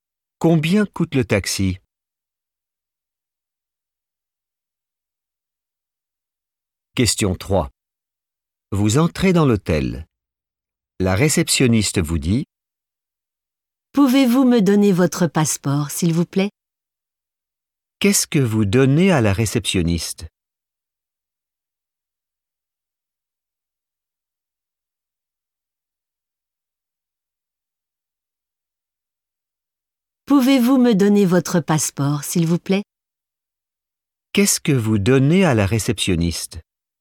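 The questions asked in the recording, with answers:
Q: Qu'est-ce que vous donnez à la réceptionniste?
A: votre passeport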